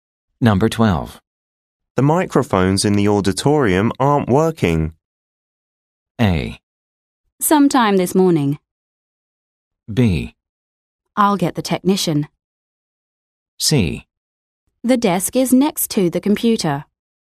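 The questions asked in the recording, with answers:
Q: The microphones in the auditorium aren't working.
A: B: I'll get the technician.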